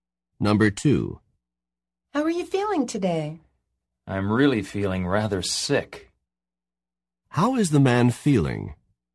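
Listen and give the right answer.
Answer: Rather sick.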